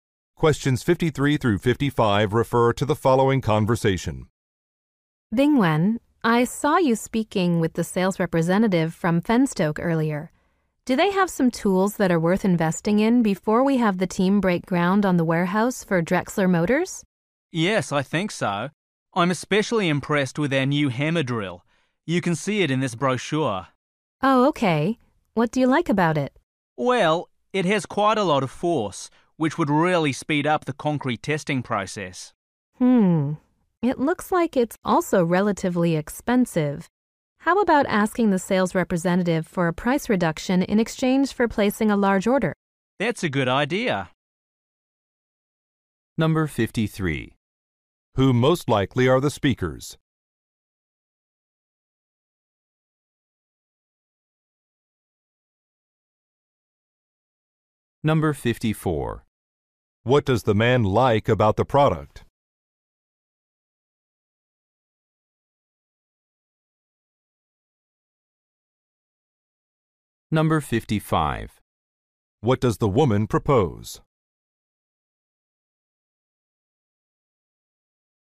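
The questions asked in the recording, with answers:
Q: What does the man like about the product?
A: It is powerful, which would speed up concrete testing

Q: What does the woman propose?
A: Asking for a price reduction for a large order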